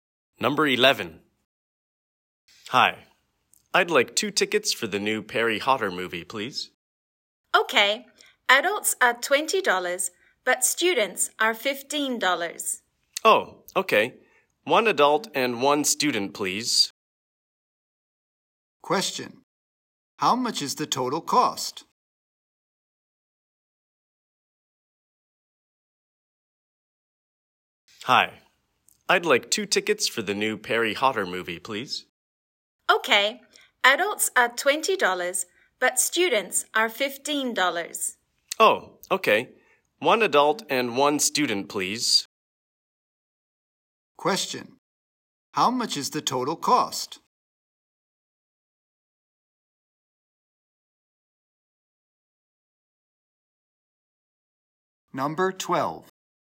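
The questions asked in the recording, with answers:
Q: How much is the total cost?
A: $35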